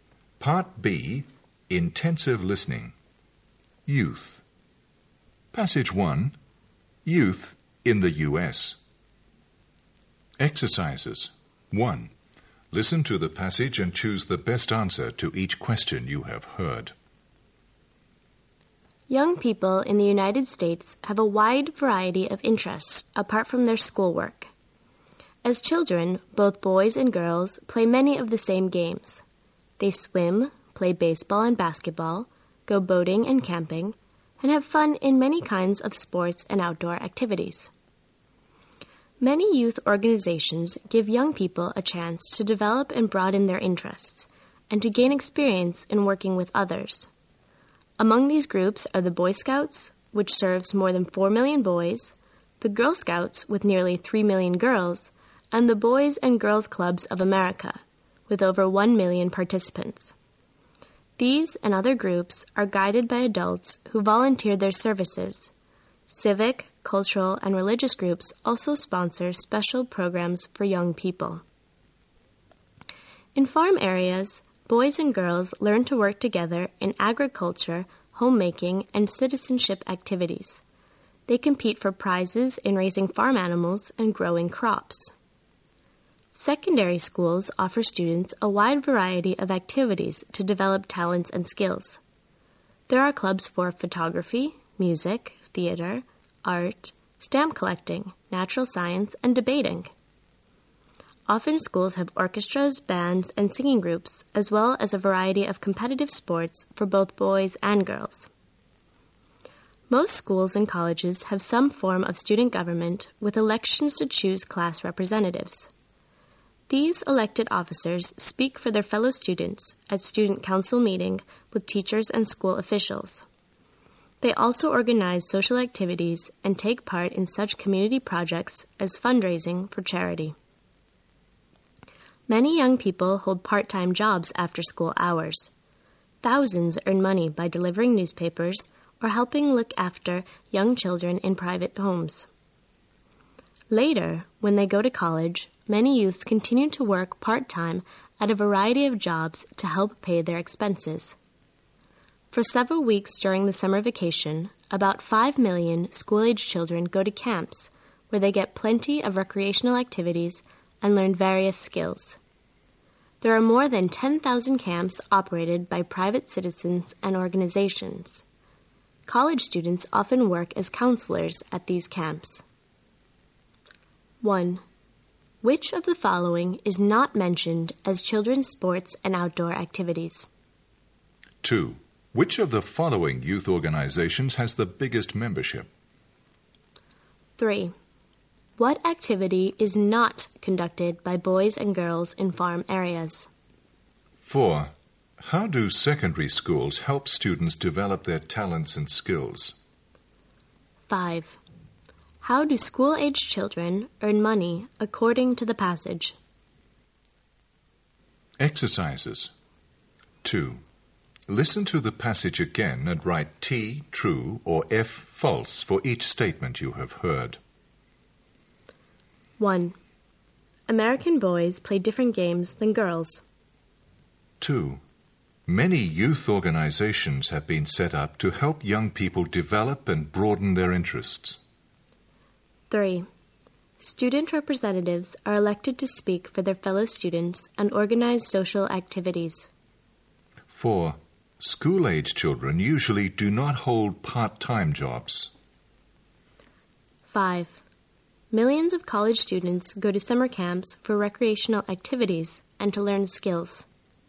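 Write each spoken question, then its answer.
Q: Which of the following youth organizations has the biggest membership?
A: The Boy Scouts

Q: How do secondary schools help students develop their talents and skills?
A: By offering a wide variety of activities such as clubs, bands and sports

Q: How do school-aged children earn money according to the passage?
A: By delivering newspapers or looking after young children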